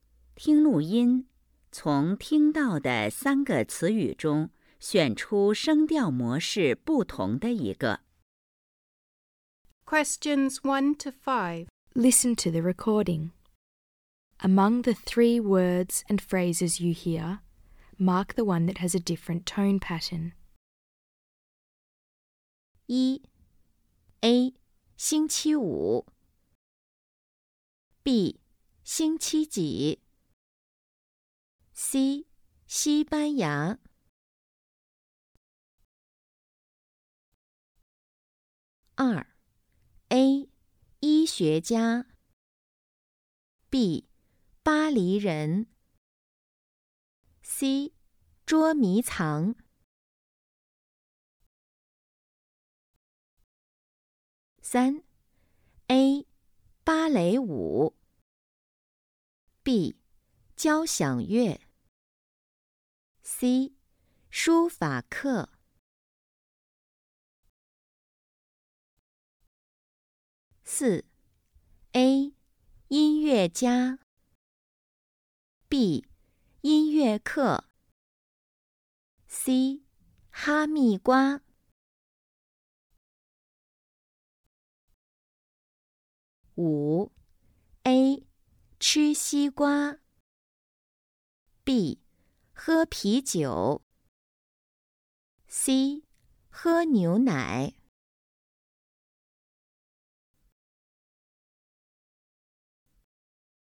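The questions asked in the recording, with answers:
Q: A 星期五 B 星期几 C 西班牙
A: C: 西班牙

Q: A 医学家 B 巴黎人 C 捉迷藏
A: A: 医学家

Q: A 芭蕾舞 B 交响乐 C 书法课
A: A: 芭蕾舞

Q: A 音乐家 B 音乐课 C 哈密瓜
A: B: 音乐课

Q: A 吃西瓜 B 喝啤酒 C 喝牛奶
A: A: 吃西瓜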